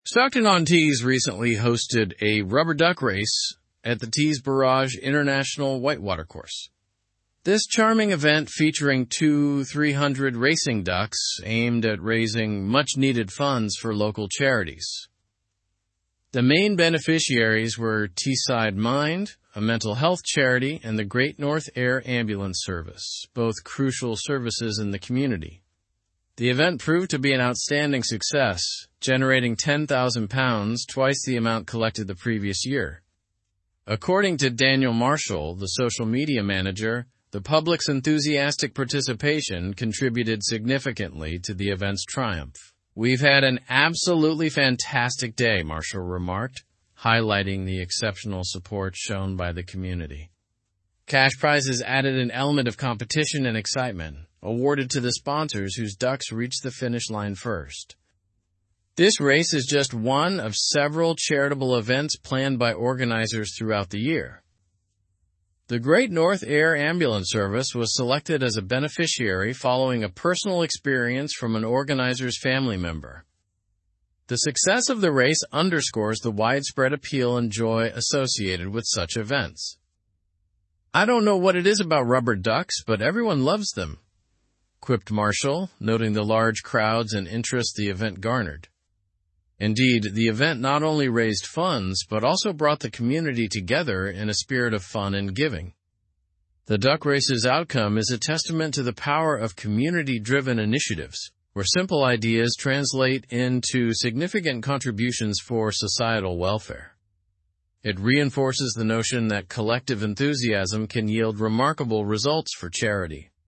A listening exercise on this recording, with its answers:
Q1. What event did Stockton-on-Tees recently host?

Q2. How many ducks participated in this event?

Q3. What was the primary objective of the duck race?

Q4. Which charities benefited from the funds raised?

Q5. How much money was raised from the event?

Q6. What added excitement to the competition?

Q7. Who is Daniel Marshall and what role did he play?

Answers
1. The town hosted a rubber duck race at the Tees Barrage International White Water Course.
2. 2,300 rubber ducks participated.
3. To raise funds for local charities.
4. Teesside Mind and the Great North Air Ambulance Service.
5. £10,000 was raised.
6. Cash prizes for sponsors of the winning ducks added excitement.
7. Daniel Marshall is the social media manager for the event.

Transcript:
Stockton-on-Tees recently hosted a rubber duck race at the Tees Barrage International White Water Course. This charming event, featuring 2,300 racing ducks, aimed at raising much-needed funds for local charities. The main beneficiaries were Teesside Mind, a mental health charity, and the Great North Air Ambulance Service, both crucial services in the community.
The event proved to be an outstanding success, generating £10,000, twice the amount collected the previous year. According to Daniel Marshall, the social media manager, the public's enthusiastic participation contributed significantly to the event's triumph. "We've had an absolutely fantastic day," Marshall remarked, highlighting the exceptional support shown by the community.
Cash prizes added an element of competition and excitement, awarded to the sponsors whose ducks reached the finish line first. This race is just one of several charitable events planned by organizers throughout the year. The Great North Air Ambulance Service was selected as a beneficiary following a personal experience from an organizer's family member.
The success of the race underscores the widespread appeal and joy associated with such events. "I don't know what it is about rubber ducks, but everyone loves them," quipped Marshall, noting the large crowds and interest the event garnered. Indeed, the event not only raised funds but also brought the community together in a spirit of fun and giving.
The duck race's outcome is a testament to the power of community-driven initiatives, where simple ideas translate into significant contributions for societal welfare.
of community-driven initiatives, where simple ideas ? into significant contributions for societal welfare. It ? the notion that collective enthusiasm can yield remarkable results for charity.

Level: Level 4